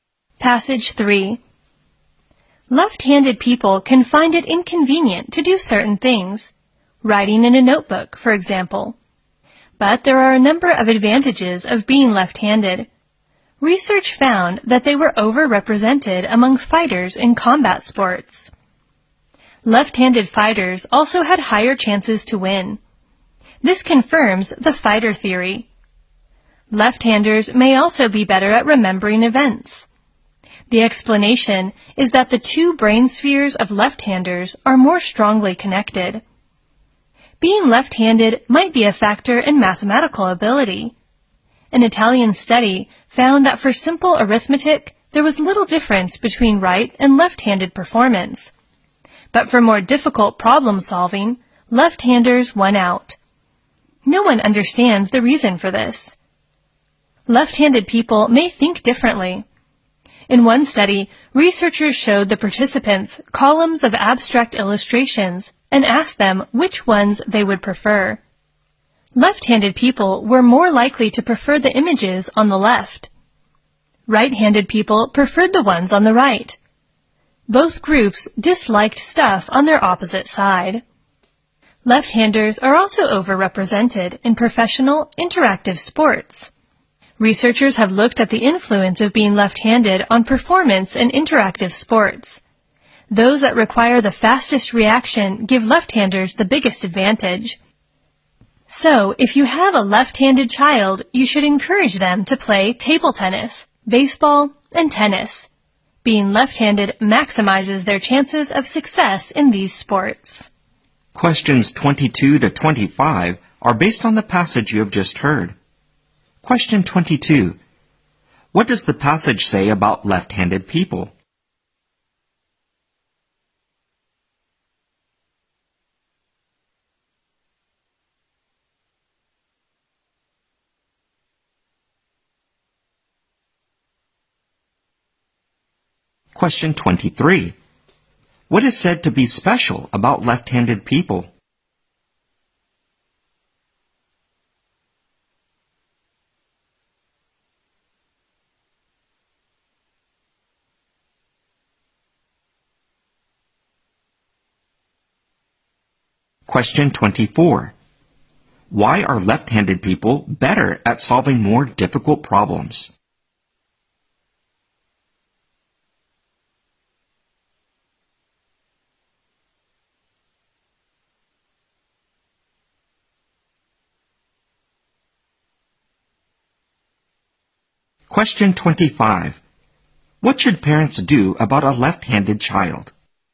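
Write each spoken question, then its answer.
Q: Why are left-handed people better at solving more difficult problems?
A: No one knows the reason

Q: What should parents do about a left-handed child?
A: Encourage the child to play fast interactive sports like table tennis, baseball and tennis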